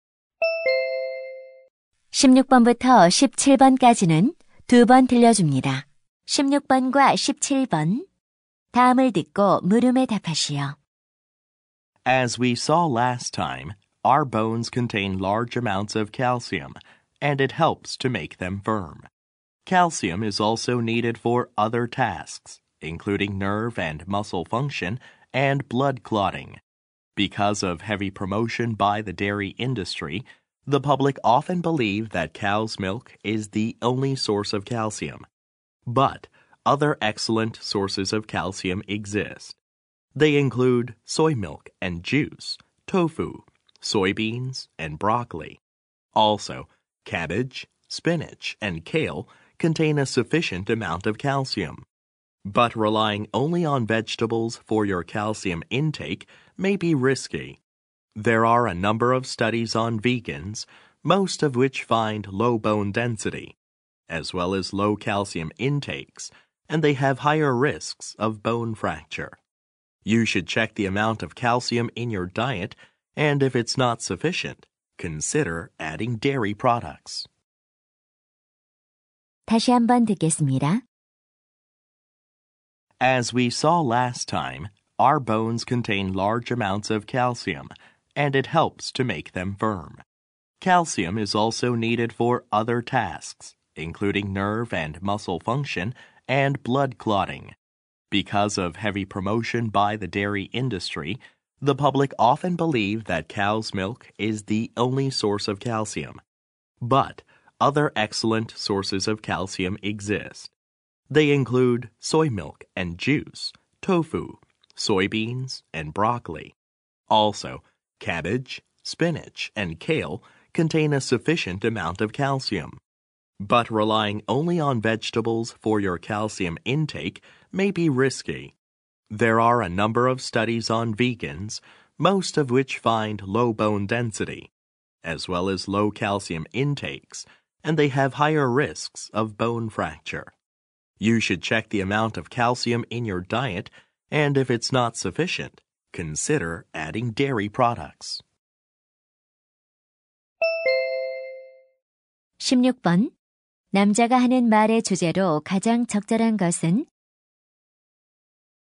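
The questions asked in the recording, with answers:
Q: 남자가 하는 말의 주제로 가장 적절한 것은?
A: 칼슘의 다양한 공급원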